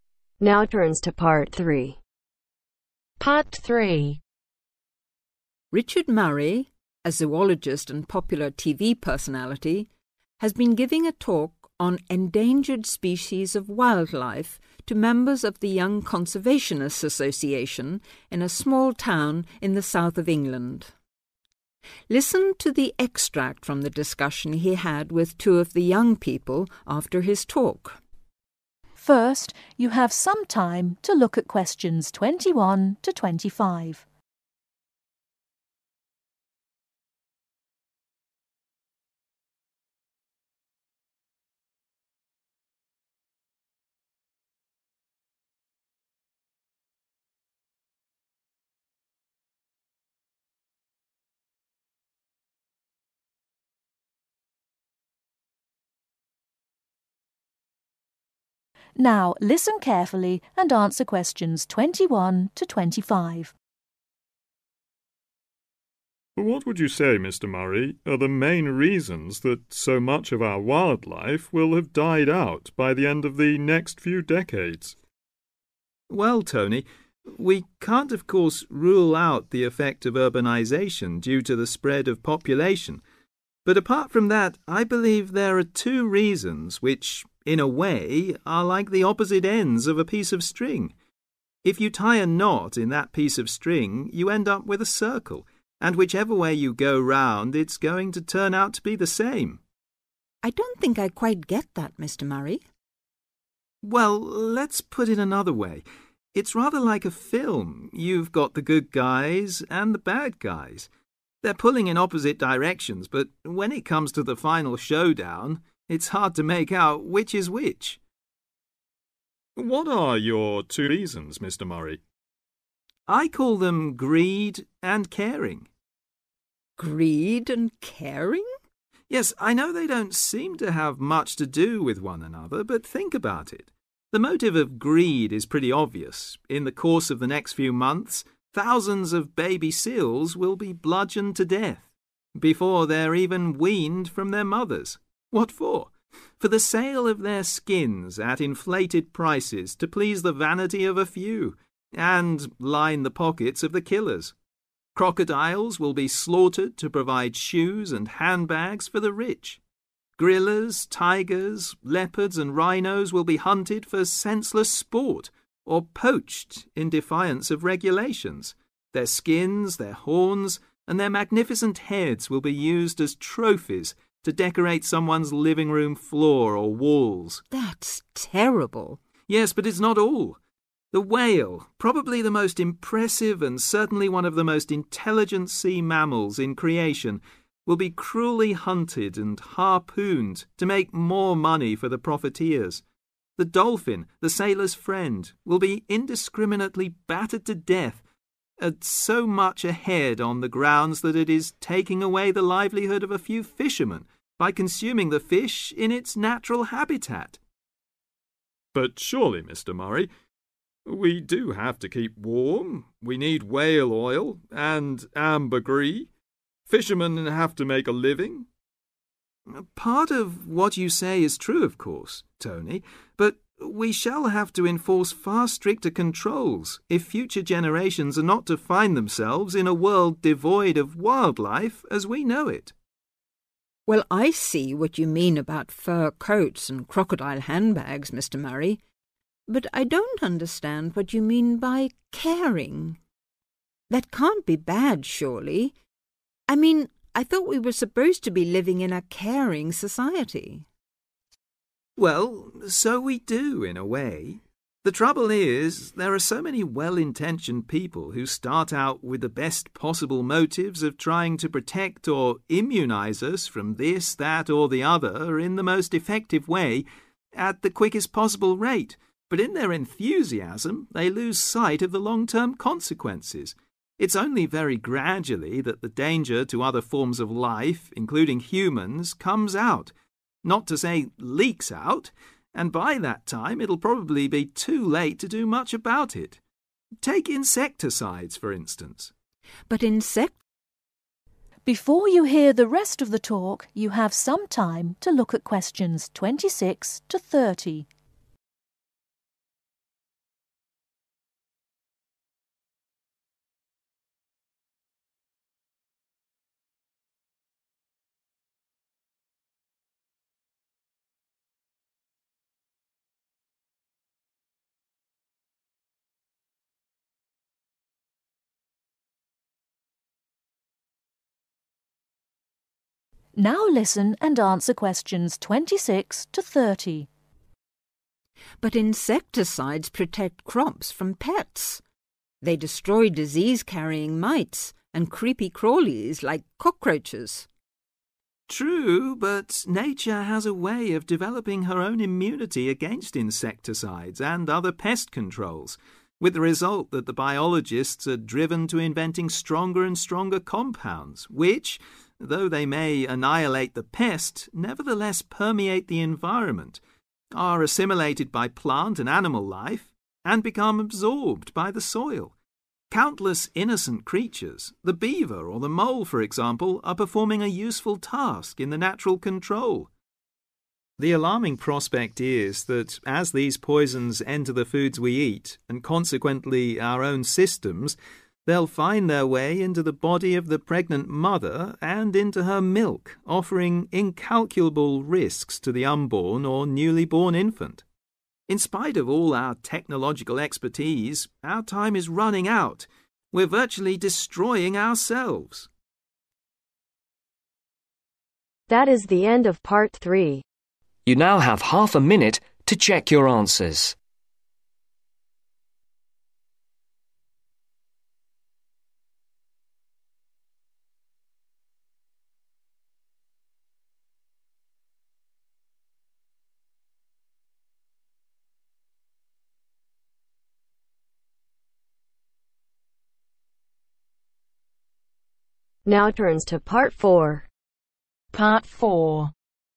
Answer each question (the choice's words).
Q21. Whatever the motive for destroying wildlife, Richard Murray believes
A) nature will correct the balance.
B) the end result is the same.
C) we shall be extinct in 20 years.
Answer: the end result is the same.

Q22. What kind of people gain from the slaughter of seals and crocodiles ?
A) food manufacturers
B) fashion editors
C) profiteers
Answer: profiteers

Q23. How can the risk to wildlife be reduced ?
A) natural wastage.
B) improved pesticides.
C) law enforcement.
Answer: law enforcement.

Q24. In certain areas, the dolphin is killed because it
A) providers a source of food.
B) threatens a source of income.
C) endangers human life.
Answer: threatens a source of income.

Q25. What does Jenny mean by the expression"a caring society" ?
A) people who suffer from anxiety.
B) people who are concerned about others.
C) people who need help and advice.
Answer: people who are concerned about others.